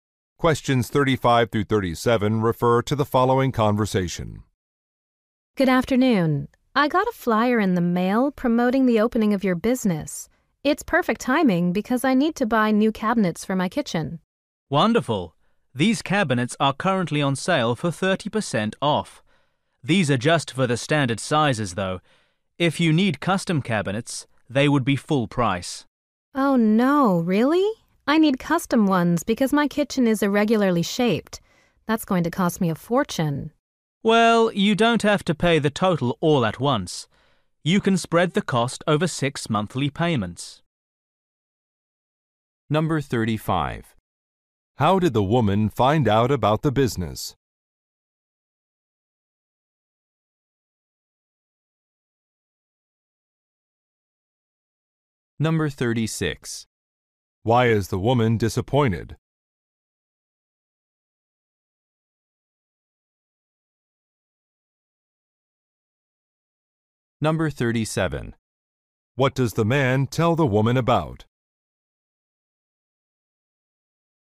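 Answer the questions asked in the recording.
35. From a flyer in the mail
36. Custom cabinets are not on sale
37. A monthly payment plan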